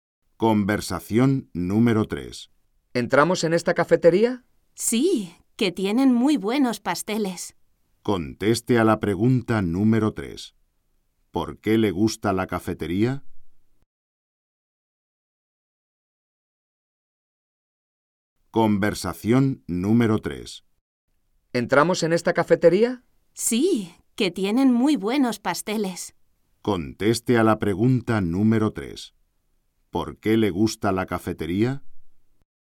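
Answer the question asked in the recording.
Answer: Porque tienen muy buenos pasteles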